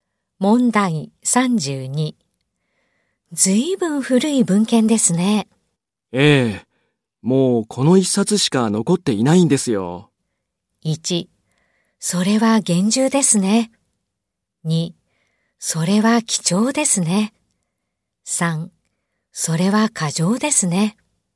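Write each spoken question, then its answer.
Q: ずいぶん古い文献ですね。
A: 2: それは貴重ですね。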